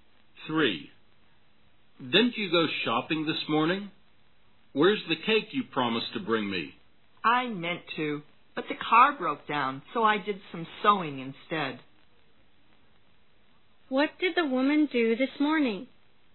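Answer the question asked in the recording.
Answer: She did some sewing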